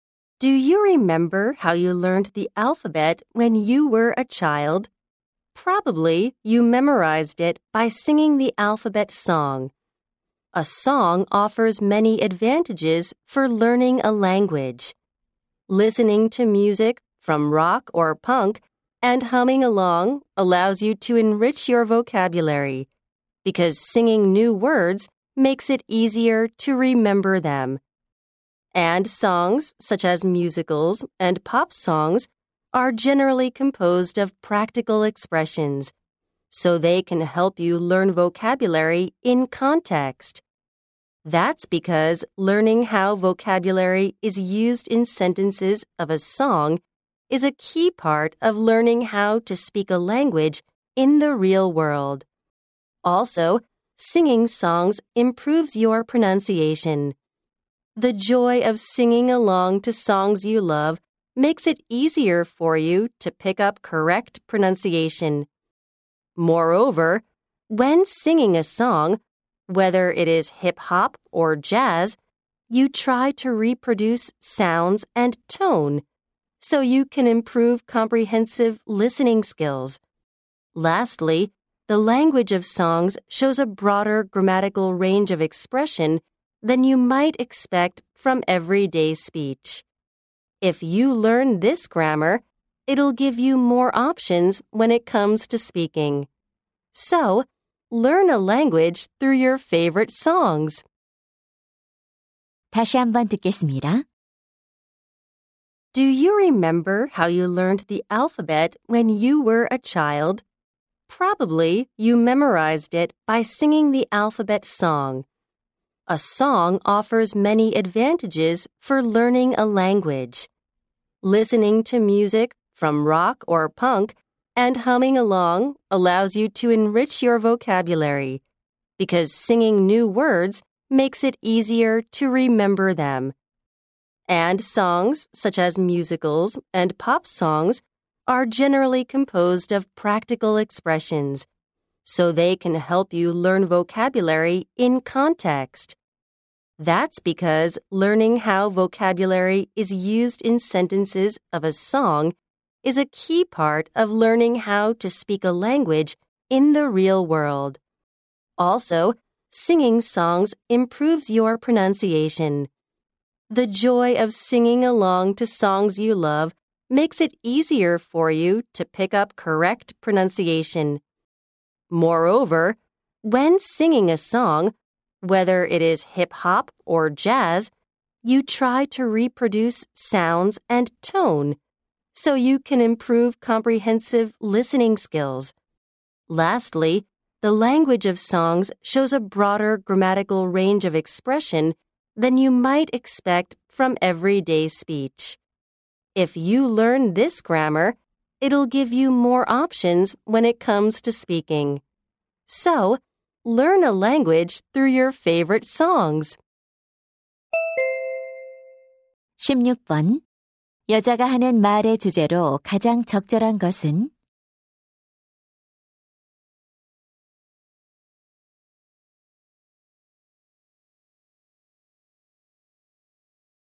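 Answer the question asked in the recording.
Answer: 노래를 통해 언어를 배우는 것의 이점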